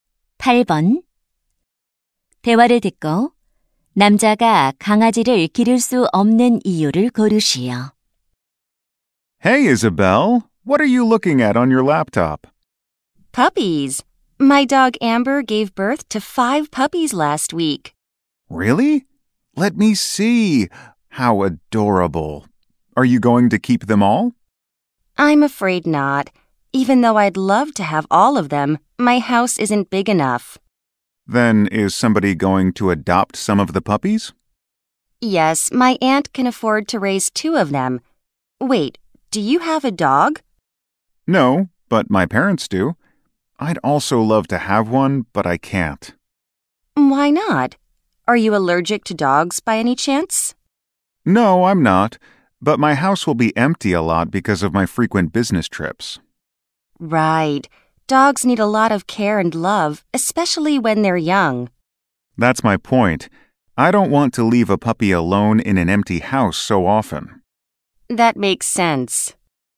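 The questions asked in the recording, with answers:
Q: 대화를 듣고 남자가 강아지를 기를 수 없는 이유를 고르시오.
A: 출장이 잦아서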